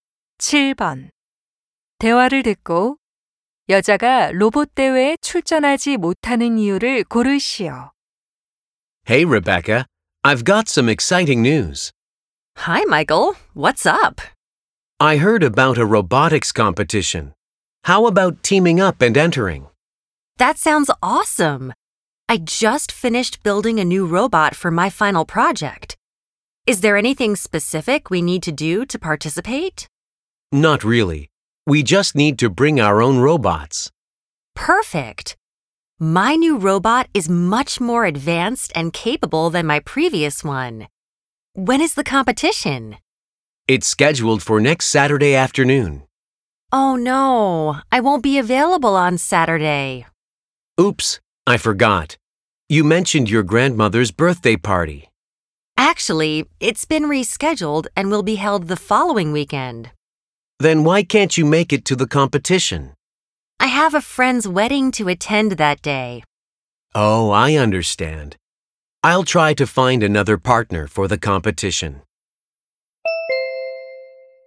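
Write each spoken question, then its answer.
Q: 대화를 듣고 여자가 로봇 대회에 출전하지 못하는 이유를 고르시오.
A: 친구 결혼식에 참석해야 해서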